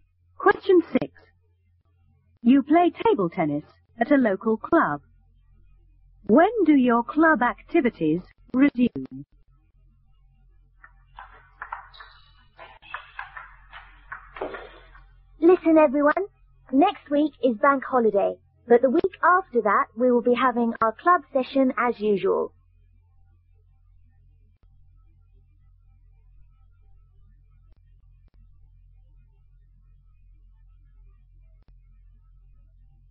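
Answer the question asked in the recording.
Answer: The week after next week (in two weeks)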